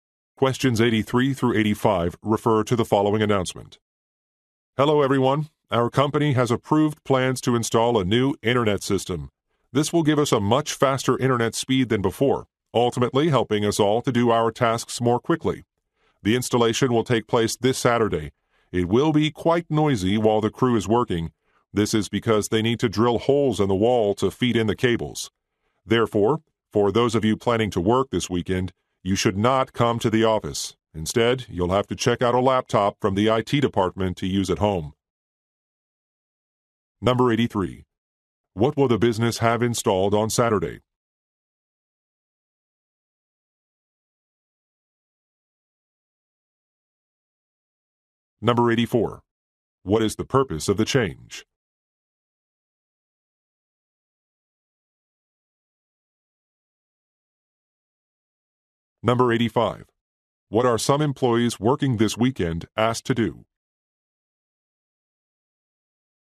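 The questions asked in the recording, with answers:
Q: What will the business have installed on Saturday?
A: A new internet system

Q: What is the purpose of the change?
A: To help employees work faster

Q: What are some employees working this weekend asked to do?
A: Check out a laptop from IT and work at home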